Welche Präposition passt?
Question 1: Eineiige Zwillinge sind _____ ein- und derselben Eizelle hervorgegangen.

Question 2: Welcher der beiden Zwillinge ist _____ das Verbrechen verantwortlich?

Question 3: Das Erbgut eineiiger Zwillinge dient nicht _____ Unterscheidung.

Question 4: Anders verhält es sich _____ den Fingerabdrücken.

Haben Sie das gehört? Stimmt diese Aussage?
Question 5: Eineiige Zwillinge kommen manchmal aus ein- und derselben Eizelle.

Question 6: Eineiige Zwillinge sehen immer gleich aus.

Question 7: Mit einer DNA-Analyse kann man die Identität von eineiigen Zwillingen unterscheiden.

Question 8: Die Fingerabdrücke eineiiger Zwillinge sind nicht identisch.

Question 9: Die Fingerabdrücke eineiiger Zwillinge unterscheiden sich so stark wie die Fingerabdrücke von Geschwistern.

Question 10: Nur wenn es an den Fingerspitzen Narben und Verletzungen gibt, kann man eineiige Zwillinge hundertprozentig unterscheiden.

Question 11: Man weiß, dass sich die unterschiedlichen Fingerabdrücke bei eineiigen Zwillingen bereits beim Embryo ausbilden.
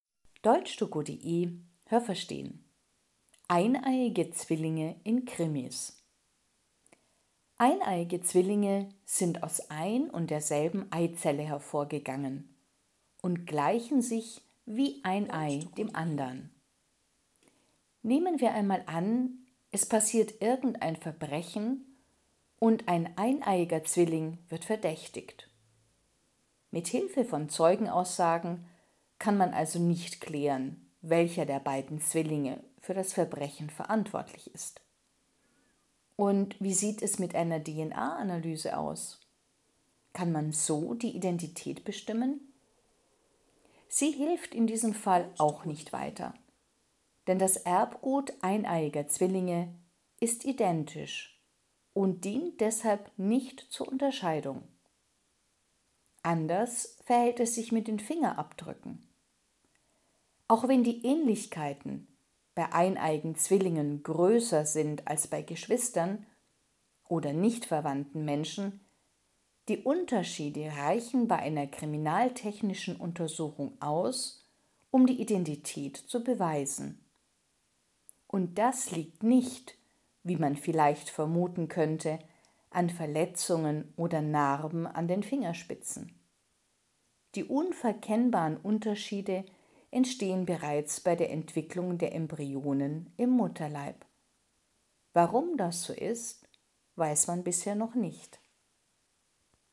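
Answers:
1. aus
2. für
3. zur
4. mit
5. falsch
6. richtig
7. falsch
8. richtig
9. falsch
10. falsch
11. richtig

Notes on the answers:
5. Das ist nicht manchmal der Fall, sondern immer.
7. Das Erbgut eineiiger Zwillinge ist identisch.
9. Die Fingerabdrücke von eineiigen Zwillingen unterscheiden sich, aber die Unterschiede sind nicht so groß wie bei Geschwistern.
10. Die Unterschiede der Fingerabdrücke liefern auch ohne Narben und Verletzungen genügend Beweise für die Identität.
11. Man weiß nur nicht, warum das so ist.

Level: B (mittel)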